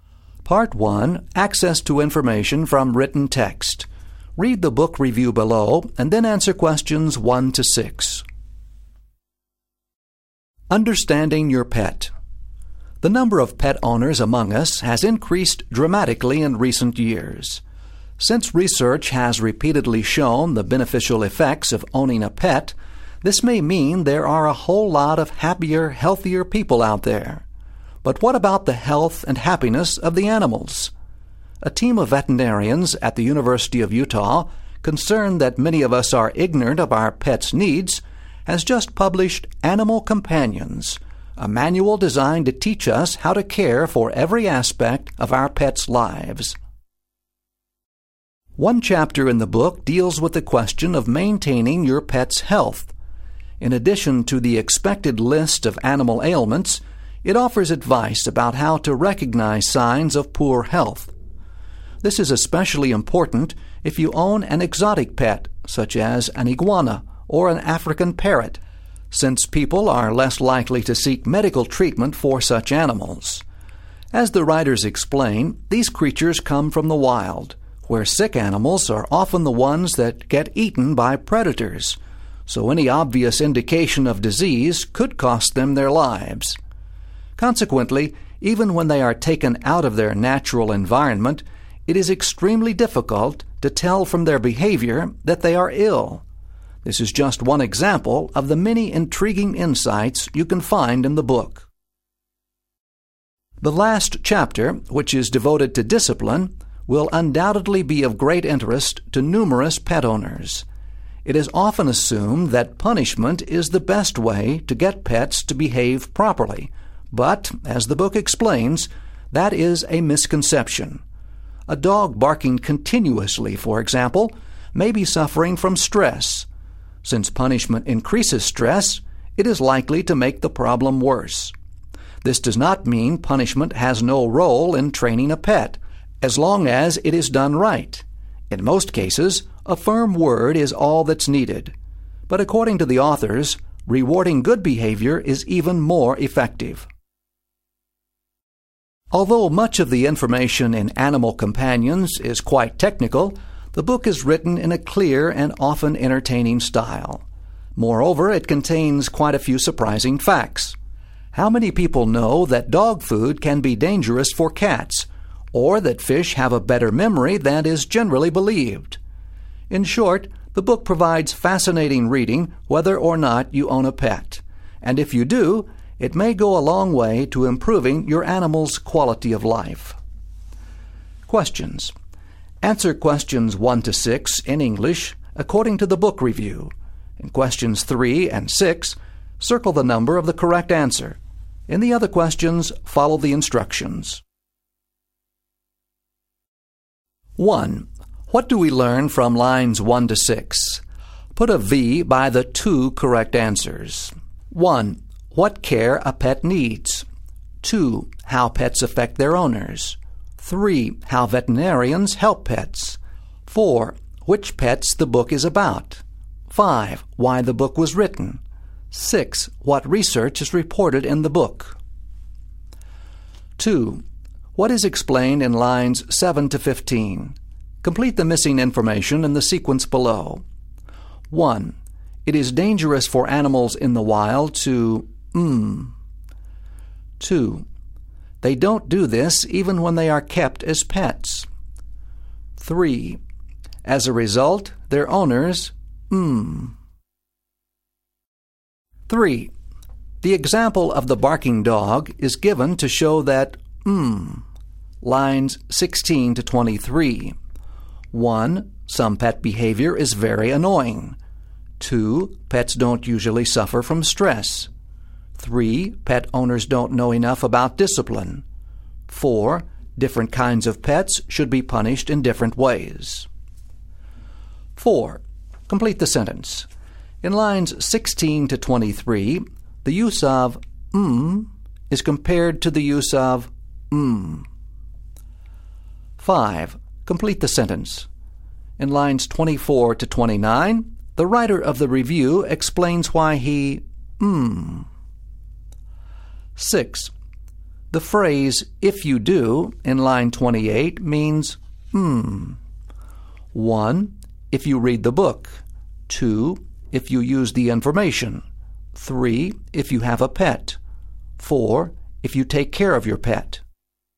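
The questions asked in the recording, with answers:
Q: The example of the barking dog is given to show that...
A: 3: Pet owners don't know enough about discipline.

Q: The phrase "if you do" in line 28 means "mm."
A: 3: If you have a pet.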